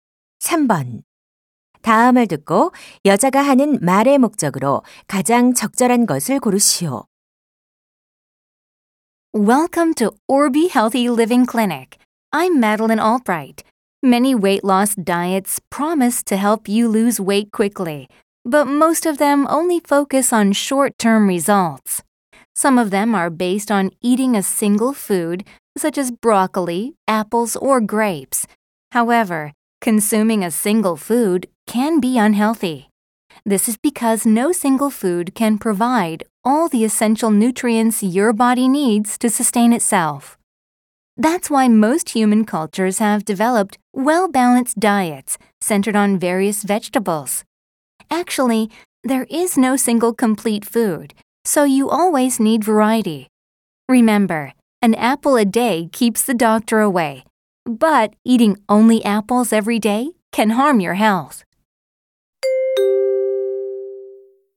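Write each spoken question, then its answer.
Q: 다음을 듣고 여자가 하는 말의 목적으로 가장 적절한 것을 고르시오.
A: 한 가지 음식만 먹는 다이어트는 건강에 해로우니 균형 잡힌 식단을 권하려고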